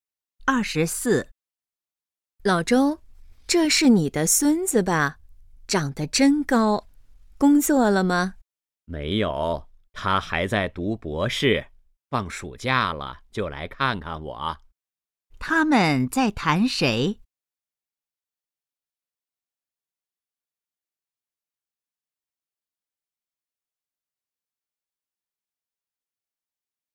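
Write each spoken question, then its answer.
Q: 他们在谈谁?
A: 老周的孙子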